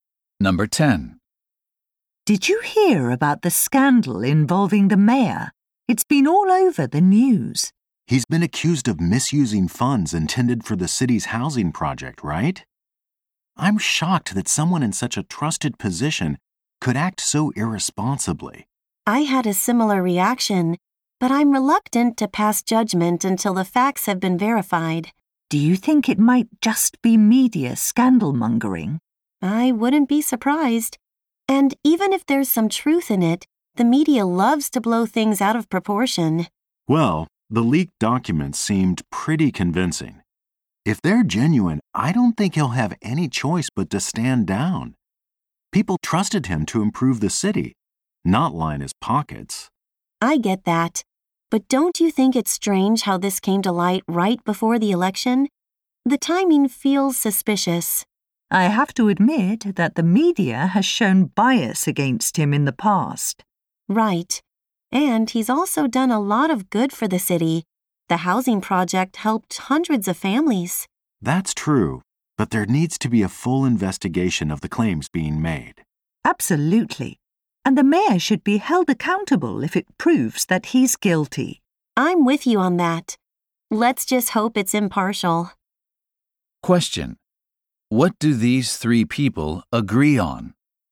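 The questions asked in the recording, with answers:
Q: What do these three people agree on?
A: The claims should be fully investigated, and the mayor held responsible if he is guilty.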